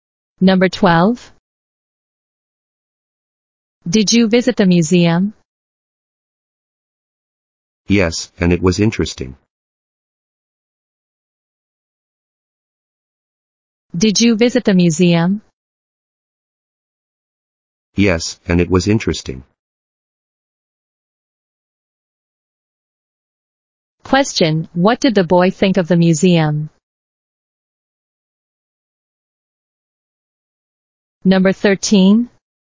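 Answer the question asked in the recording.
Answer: It was interesting.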